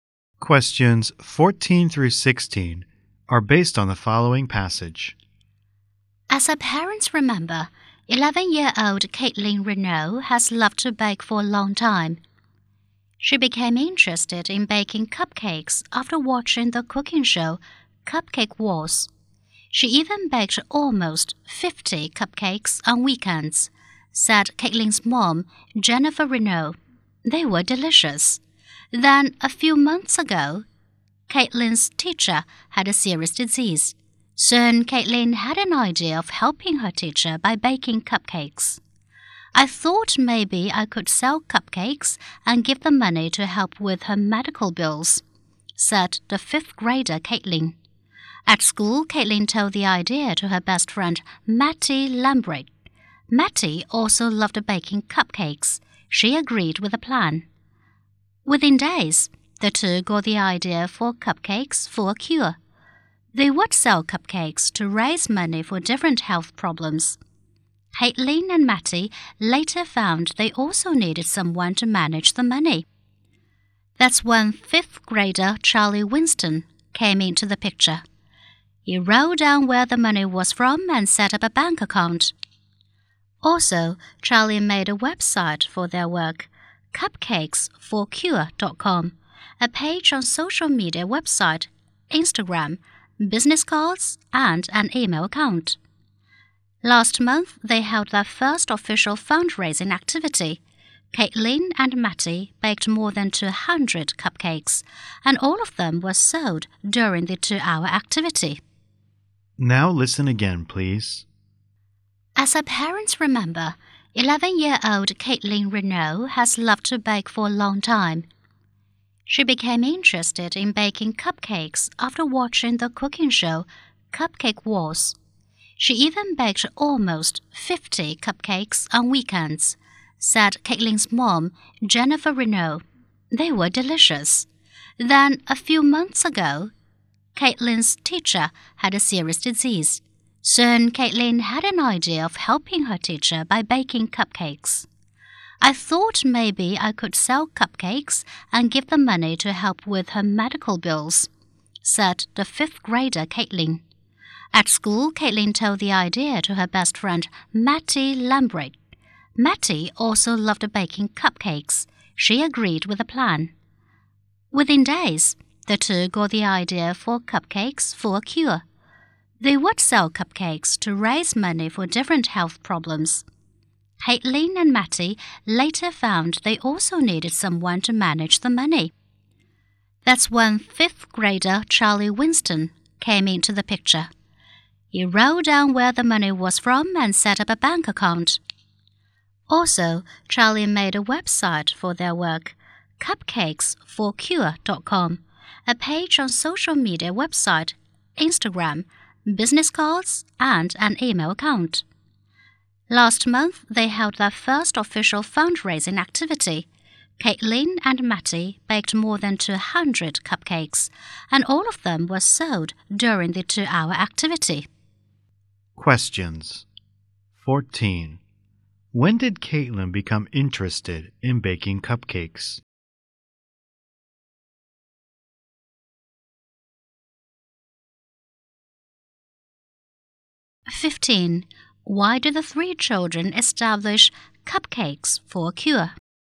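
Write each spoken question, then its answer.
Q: When did Caitlin become interested in baking cupcakes?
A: After watching the cooking show Cupcake Wars

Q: Why do the three children establish Cupcakes for a Cure?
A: To raise money for different health problems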